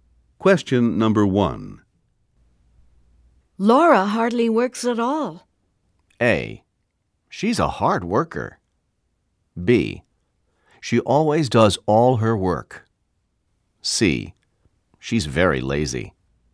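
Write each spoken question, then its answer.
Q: Laura hardly works at all.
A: C: She's very lazy.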